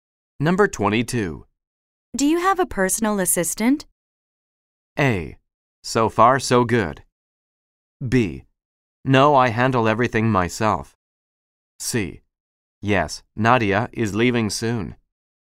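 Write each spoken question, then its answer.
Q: Do you have a personal assistant?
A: B: No, I handle everything myself.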